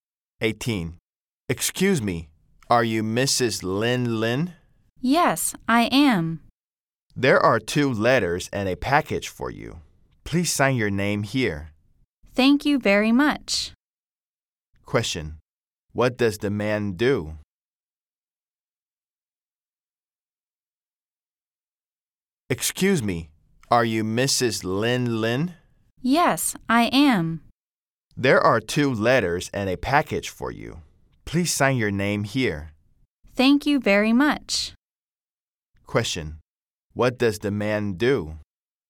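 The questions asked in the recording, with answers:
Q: What does the man do?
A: He is a mail carrier.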